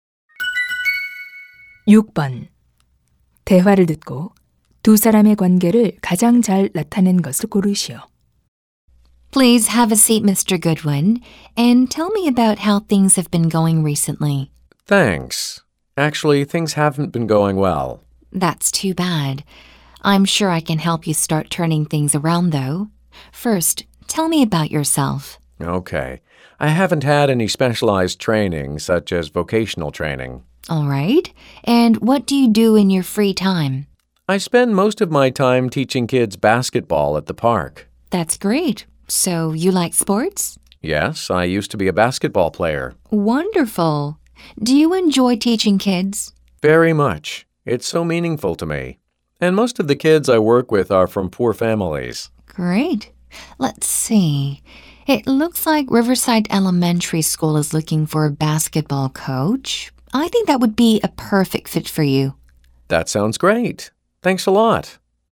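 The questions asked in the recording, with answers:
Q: 6번 대화를 듣고 두 사람의 관계를 가장 잘 나타낸 것을 고르시오.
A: 직업 상담사 - 구직자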